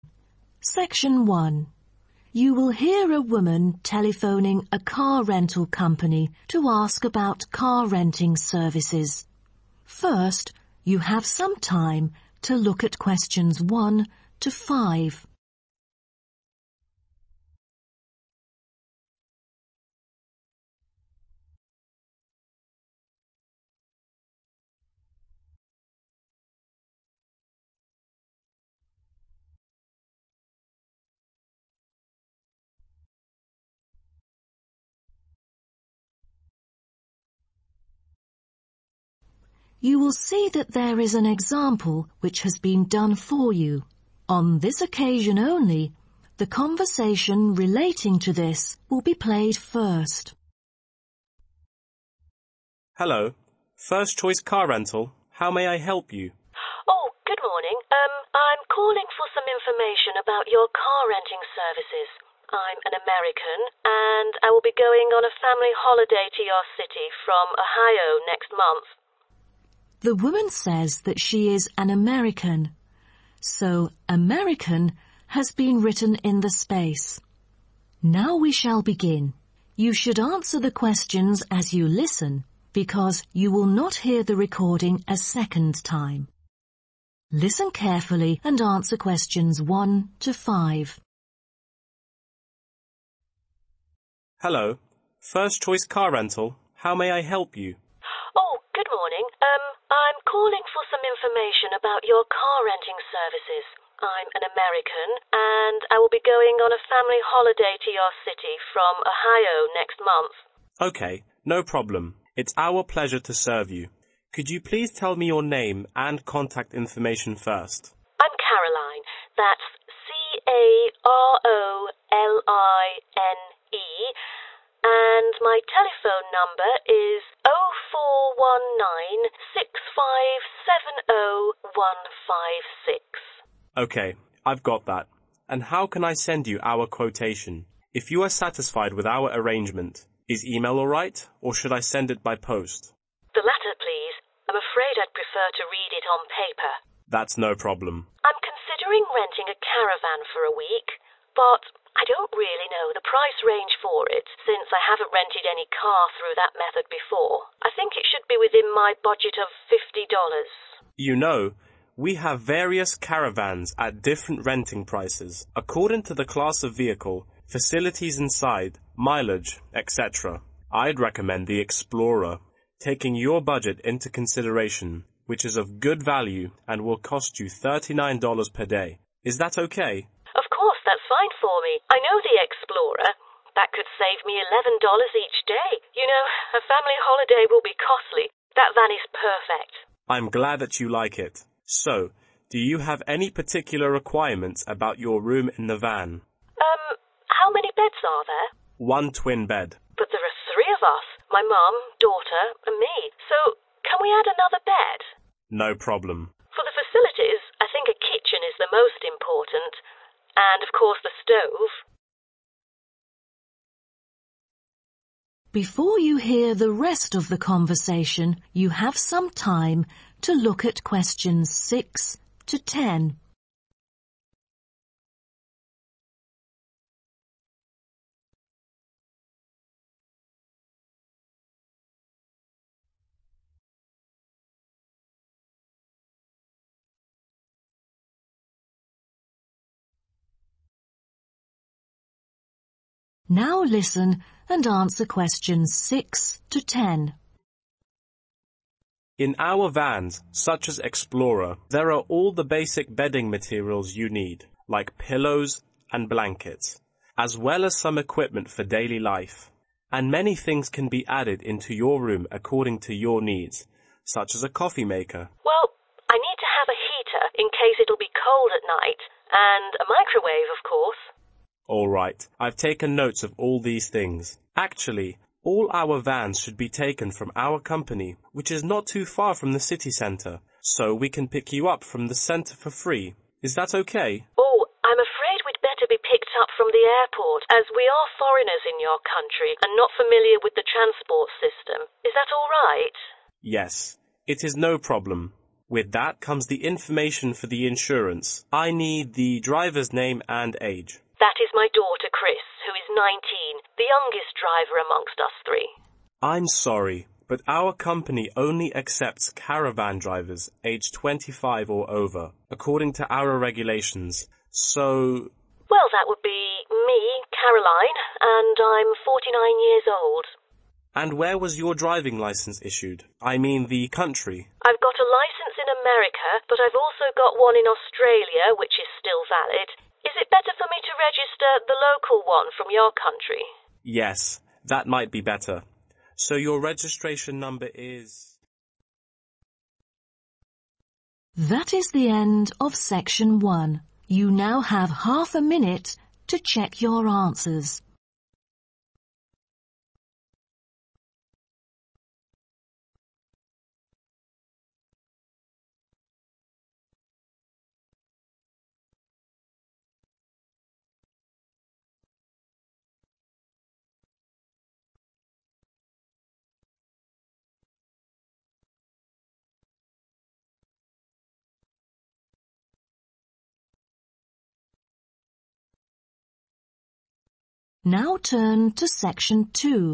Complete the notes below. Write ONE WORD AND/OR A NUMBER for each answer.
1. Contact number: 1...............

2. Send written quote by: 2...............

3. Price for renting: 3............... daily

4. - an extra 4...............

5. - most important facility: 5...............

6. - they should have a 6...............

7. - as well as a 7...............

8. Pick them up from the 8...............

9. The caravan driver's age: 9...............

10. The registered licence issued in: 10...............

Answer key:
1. 04196570156
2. post
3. $39
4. bed
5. kitchen
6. heater
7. microwave
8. airport
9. 49
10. Australia